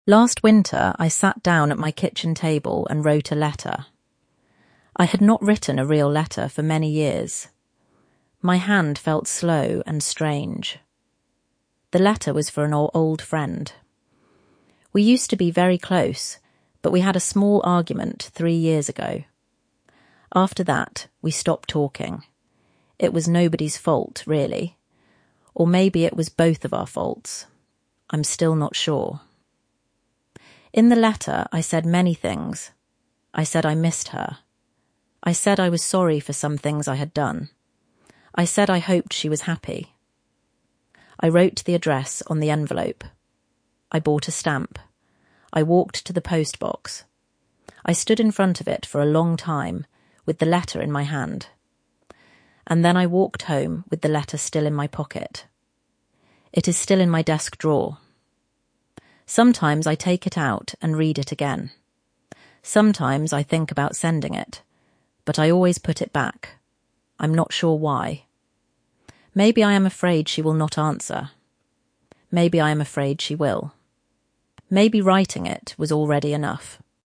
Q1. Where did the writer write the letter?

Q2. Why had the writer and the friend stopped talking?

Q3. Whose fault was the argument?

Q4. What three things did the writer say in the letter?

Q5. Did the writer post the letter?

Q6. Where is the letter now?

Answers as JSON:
{"1": "At the kitchen table.", "2": "They had a small argument three years ago and after that they stopped talking.", "3": "The writer is not sure. Maybe nobody's. Maybe both of theirs.", "4": "(1) I missed you. (2) I am sorry for some things I had done. (3) I hope you are happy.", "5": "No. The writer stood in front of the post box, then walked home with the letter still in their pocket.", "6": "In the writer's desk drawer."}

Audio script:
Last winter, I sat down at my kitchen table and wrote a letter. I had not written a real letter for many years. My hand felt slow and strange.
The letter was for an old friend. We used to be very close, but we had a small argument three years ago. After that, we stopped talking. It was nobody's fault, really. Or maybe it was both of our faults. I'm still not sure.
In the letter, I said many things. I said I missed her. I said I was sorry for some things I had done. I said I hoped she was happy.
I wrote the address on the envelope. I bought a stamp. I walked to the post box. I stood in front of it for a long time, with the letter in my hand.
And then I walked home with the letter still in my pocket.
It is still in my desk drawer. Sometimes I take it out and read it again. Sometimes I think about sending it. But I always put it back.
I'm not sure why. Maybe I am afraid she will not answer. Maybe writing it was already enough.